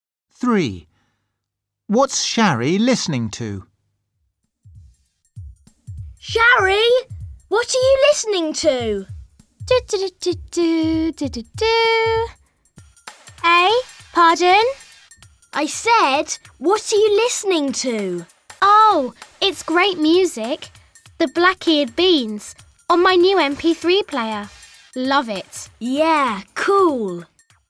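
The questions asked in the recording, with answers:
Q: What's Shari listening to?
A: music on her new MP3 player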